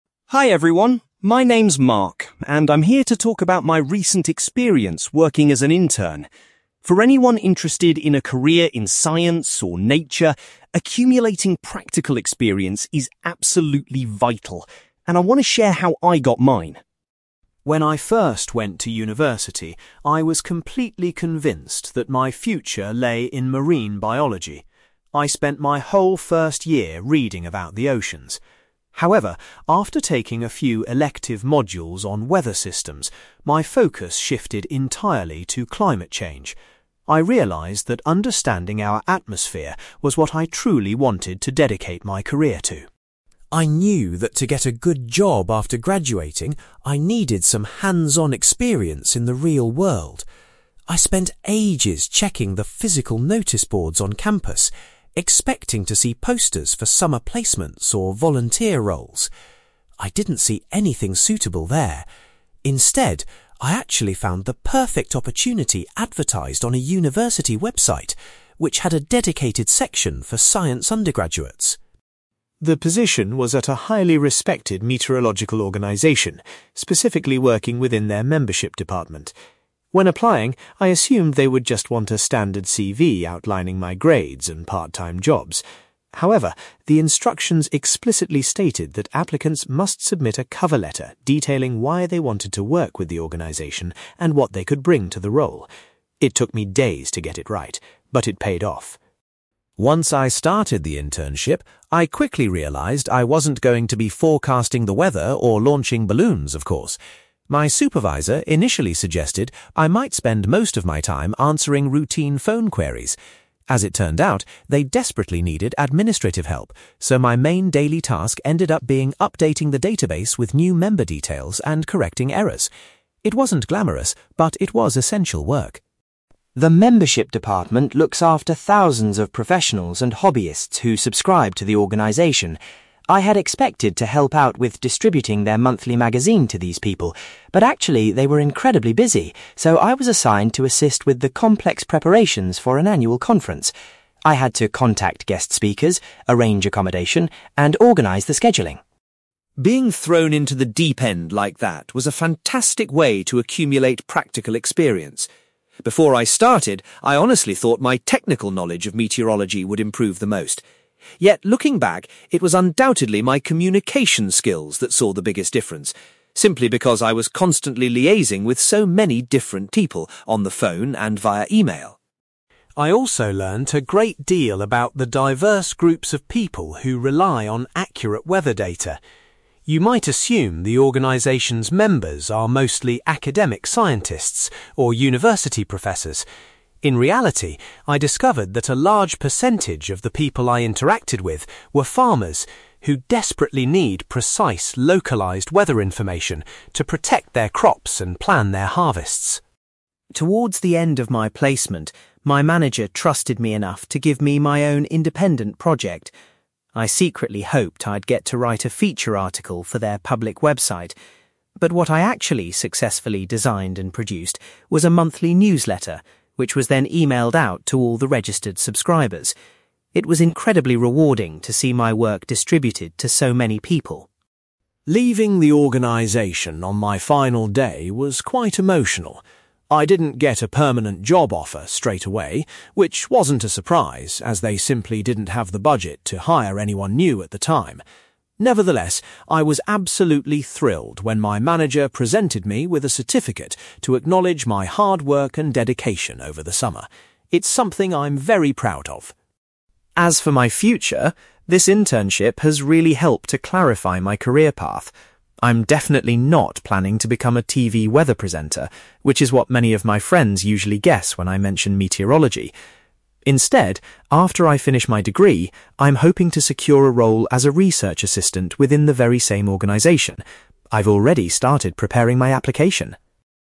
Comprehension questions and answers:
You will hear a young man called Mark giving a talk about his internship at a meteorological organization. For questions 9-18, complete the sentences with a word or short phrase.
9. Mark's main area of academic interest changed to (9)........................... after he studied weather systems.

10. Mark discovered the advertisement for his internship while he was looking at a (10)........................... .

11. Mark was surprised that he was required to provide a (11)........................... as part of his job application.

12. Mark's primary responsibility during his internship involved making changes to the organization's (12)........................... .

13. Mark was tasked with helping organize an (13)........................... for the members of the organization.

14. Mark believes that his (14)........................... developed the most during his time at the organization.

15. Mark found it surprising that so many of the organization's members were (15)........................... .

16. Before finishing his internship, Mark created a (16)........................... that was sent to subscribers.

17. On his last day, Mark was pleased to be given a (17)........................... as a reward for his efforts.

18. Following his graduation, Mark's ambition is to work as a (18)........................... .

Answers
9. climate change
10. university website
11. cover letter
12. database
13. annual conference
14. communication skills
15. farmers
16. monthly newsletter
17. certificate
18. research assistant

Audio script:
Mark: Hi everyone, my name is Mark, and I'm here to talk about my recent experience working as an intern. For anyone interested in a career in science or nature, accumulating practical experience is absolutely vital, and I want to share how I got mine.
When I first went to university, I was completely convinced that my future lay in marine biology. I spent my whole first year reading about the oceans. However, after taking a few elective modules on weather systems, my focus shifted entirely to climate change. I realized that understanding our atmosphere was what I truly wanted to dedicate my career to.
I knew that to get a good job after graduating, I needed some hands-on experience in the real world. I spent ages checking the physical noticeboards on campus, expecting to see posters for summer placements or volunteer roles. I didn't see anything suitable there. Instead, I actually found the perfect opportunity advertised on a university website, which had a dedicated section for science undergraduates.
The position was at a highly respected meteorological organization, specifically working within their membership department. When applying, I assumed they would just want a standard CV outlining my grades and part-time jobs. However, the instructions explicitly stated that applicants must submit a cover letter detailing why they wanted to work with the organization and what they could bring to the role. It took me days to get it right, but it paid off!
Once I started the internship, I quickly realized I wasn't going to be forecasting the weather or launching balloons, of course! My supervisor initially suggested I might spend most of my time answering routine phone queries. As it turned out, they desperately needed administrative help, so my main daily task ended up being updating the database with new member details and correcting errors. It wasn't glamorous, but it was essential work.
The membership department looks after thousands of professionals and hobbyists who subscribe to the organization. I had expected to help out with distributing their monthly magazine to these people. But actually, they were incredibly busy, so I was assigned to assist with the complex preparations for an annual conference. I had to contact guest speakers, arrange accommodation, and organize the scheduling.
Being thrown into the deep end like that was a fantastic way to accumulate practical experience. Before I started, I honestly thought my technical knowledge of meteorology would improve the most. Yet, looking back, it was undoubtedly my communication skills that saw the biggest difference, simply because I was constantly liaising with so many different people on the phone and via email.
I also learned a great deal about the diverse groups of people who rely on accurate weather data. You might assume the organization's members are mostly academic scientists or university professors. In reality, I discovered that a large percentage of the people I interacted with were farmers, who desperately need precise, localized weather information to protect their crops and plan their harvests.
Towards the end of my placement, my manager trusted me enough to give me my own independent project. I secretly hoped I'd get to write a feature article for their public website. But what I actually successfully designed and produced was a monthly newsletter, which was then emailed out to all the registered subscribers. It was incredibly rewarding to see my work distributed to so many people.
Leaving the organization on my final day was quite emotional. I didn't get a permanent job offer straight away, which wasn't a surprise as they simply didn't have the budget to hire anyone new at the time. Nevertheless, I was absolutely thrilled when my manager presented me with a certificate to acknowledge my hard work and dedication over the summer. It's something I'm very proud of.
As for my future, this internship has really helped to clarify my career path. I'm definitely not planning to become a TV weather presenter, which is what many of my friends usually guess when I mention meteorology! Instead, after I finish my degree, I'm hoping to secure a role as a research assistant within the very same organization. I've already started preparing my application!

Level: B2